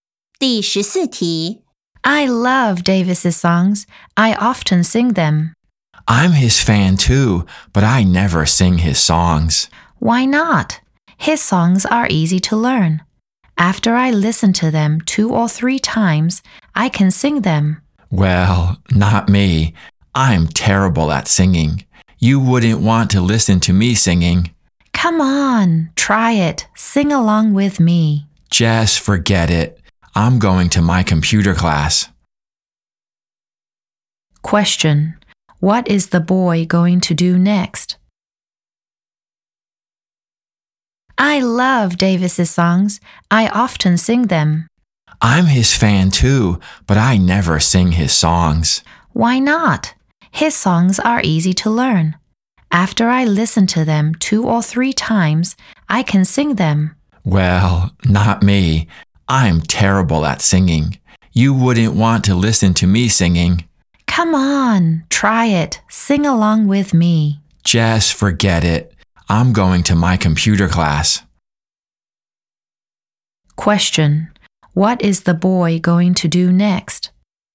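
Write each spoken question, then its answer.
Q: What is the boy going to do next?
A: Go to his computer class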